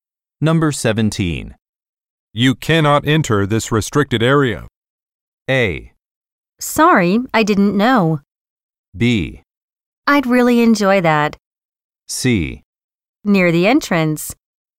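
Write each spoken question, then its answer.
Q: You cannot enter this restricted area.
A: A: Sorry, I didn't know.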